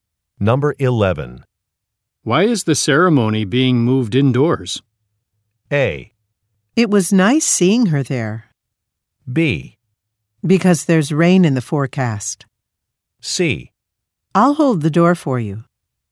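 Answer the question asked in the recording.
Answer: B: Because there's rain in the forecast.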